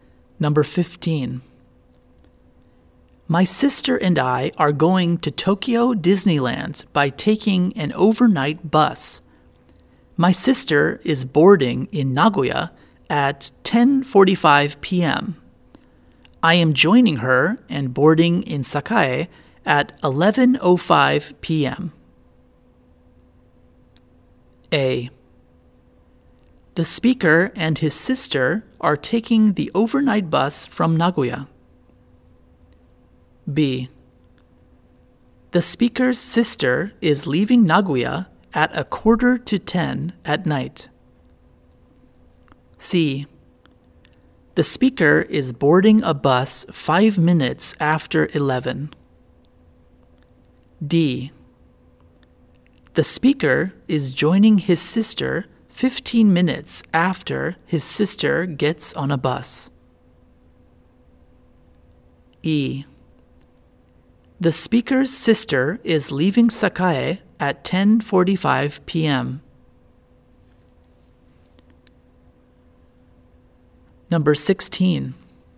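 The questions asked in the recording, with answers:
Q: My sister and I are going to Tokyo Disneyland by taking an overnight bus.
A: C: The speaker is boarding a bus 5 minutes after 11.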